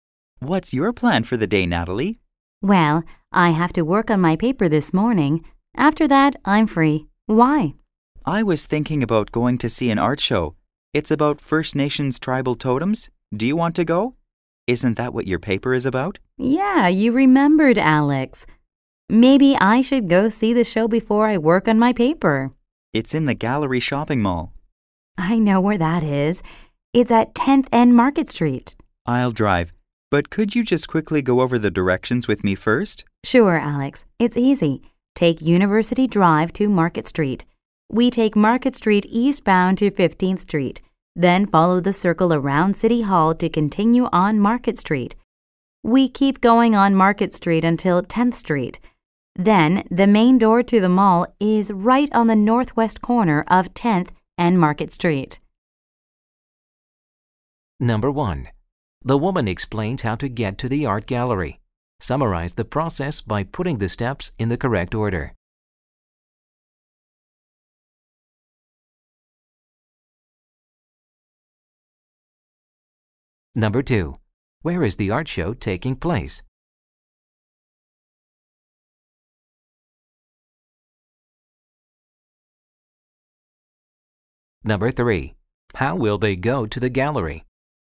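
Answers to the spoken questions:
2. In the Gallery Shopping Mall, at 10th and Market Street
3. By car; Alex will drive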